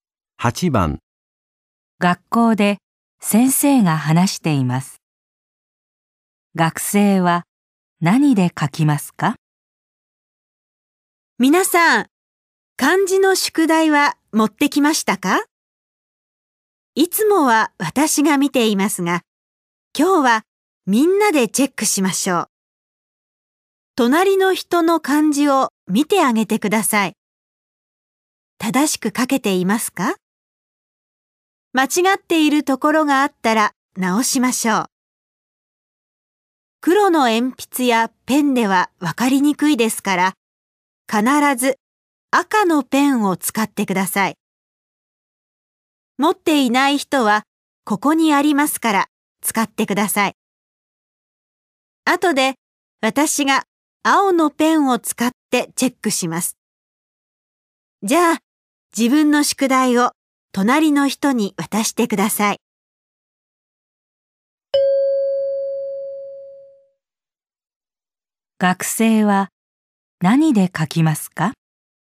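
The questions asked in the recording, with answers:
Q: 学生は何で書きますか?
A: 赤のペン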